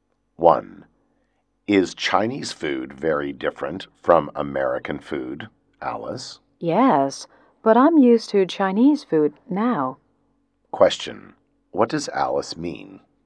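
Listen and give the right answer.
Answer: She is used to Chinese food now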